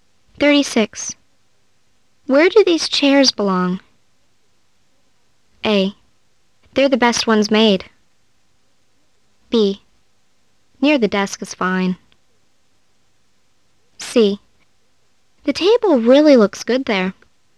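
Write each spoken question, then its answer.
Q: Where do these chairs belong?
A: B: Near the desk is fine.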